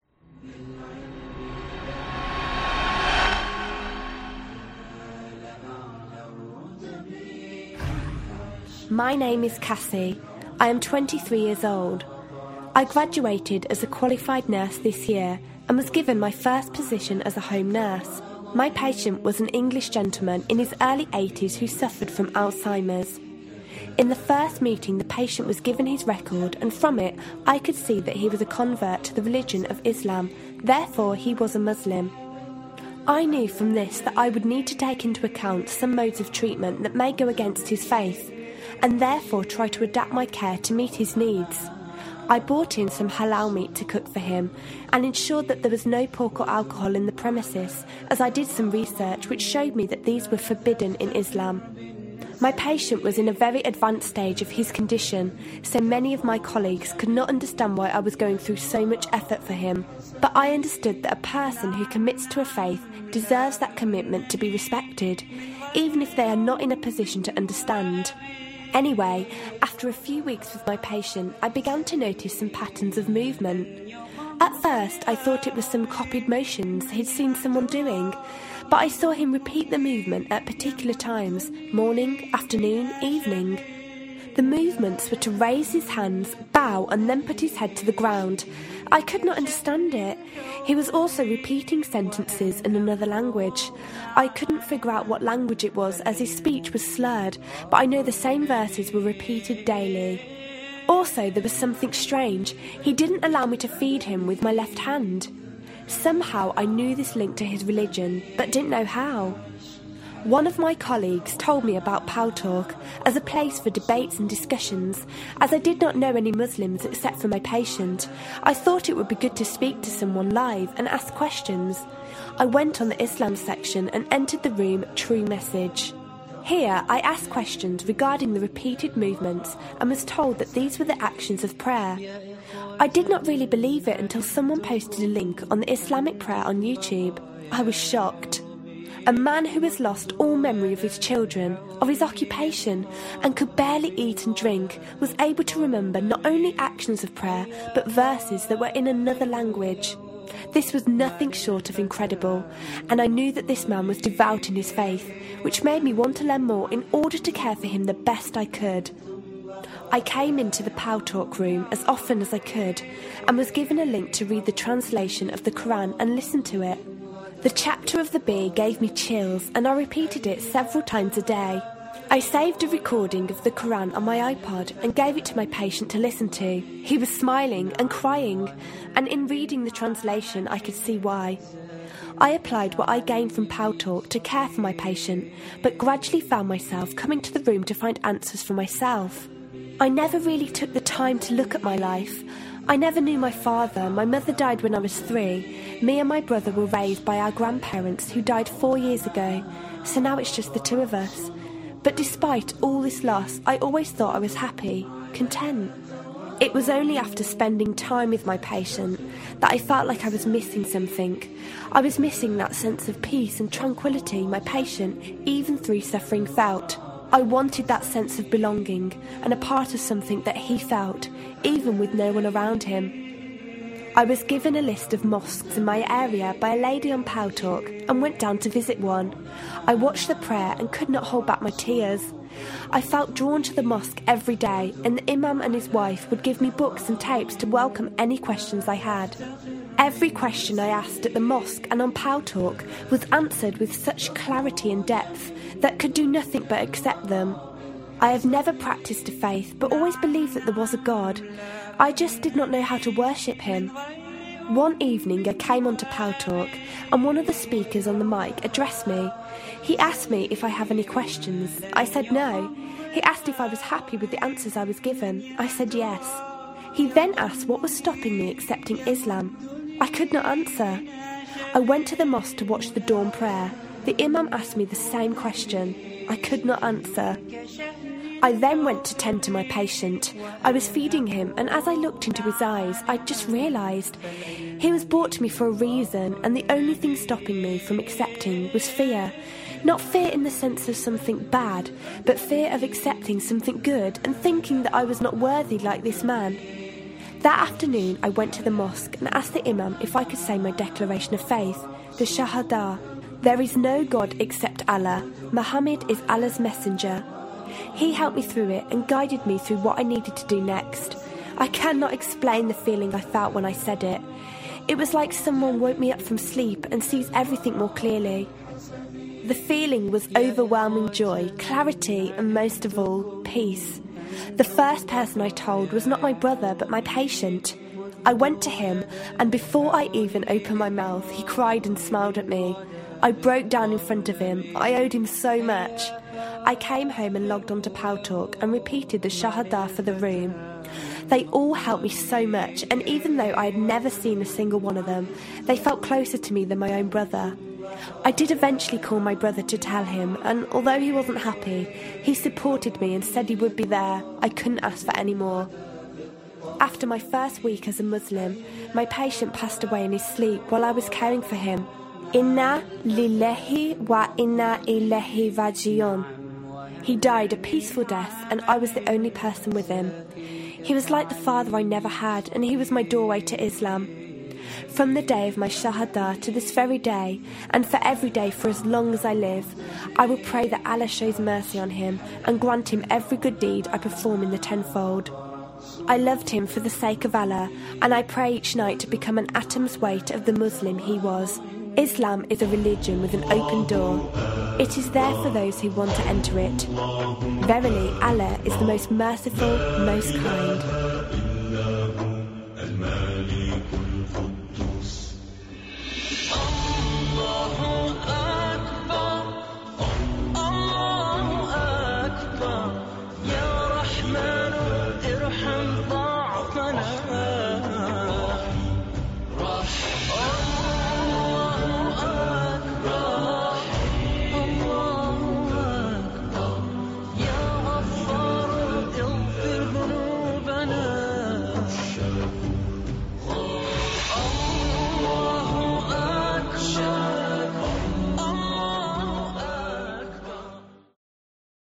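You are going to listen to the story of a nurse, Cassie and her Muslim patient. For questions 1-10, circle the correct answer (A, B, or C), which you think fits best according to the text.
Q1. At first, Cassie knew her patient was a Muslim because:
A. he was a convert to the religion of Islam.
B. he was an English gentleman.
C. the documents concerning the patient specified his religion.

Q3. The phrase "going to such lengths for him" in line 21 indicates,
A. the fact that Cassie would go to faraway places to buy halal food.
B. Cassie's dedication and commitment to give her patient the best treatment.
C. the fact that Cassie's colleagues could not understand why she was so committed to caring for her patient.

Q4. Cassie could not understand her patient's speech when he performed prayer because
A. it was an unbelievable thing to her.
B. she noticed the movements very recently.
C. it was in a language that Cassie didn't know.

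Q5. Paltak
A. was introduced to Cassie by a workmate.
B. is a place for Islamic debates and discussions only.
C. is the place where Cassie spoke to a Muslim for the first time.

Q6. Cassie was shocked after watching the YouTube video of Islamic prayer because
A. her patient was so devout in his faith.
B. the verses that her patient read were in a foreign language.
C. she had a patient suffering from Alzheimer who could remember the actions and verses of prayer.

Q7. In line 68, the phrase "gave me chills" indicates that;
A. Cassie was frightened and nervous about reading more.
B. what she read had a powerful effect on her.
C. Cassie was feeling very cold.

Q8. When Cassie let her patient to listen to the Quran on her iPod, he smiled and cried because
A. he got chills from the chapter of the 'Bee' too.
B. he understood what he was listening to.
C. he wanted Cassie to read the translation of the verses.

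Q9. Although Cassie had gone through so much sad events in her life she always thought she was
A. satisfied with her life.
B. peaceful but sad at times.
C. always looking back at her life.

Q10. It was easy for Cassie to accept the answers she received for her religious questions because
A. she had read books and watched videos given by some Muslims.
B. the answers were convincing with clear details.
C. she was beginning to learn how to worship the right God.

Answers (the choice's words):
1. the documents concerning the patient specified his religion.
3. Cassie's dedication and commitment to give her patient the best treatment.
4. it was in a language that Cassie didn't know.
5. was introduced to Cassie by a workmate.
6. she had a patient suffering from Alzheimer who could remember the actions and verses of prayer.
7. what she read had a powerful effect on her.
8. he understood what he was listening to.
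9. satisfied with her life.
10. the answers were convincing with clear details.

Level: secondary grades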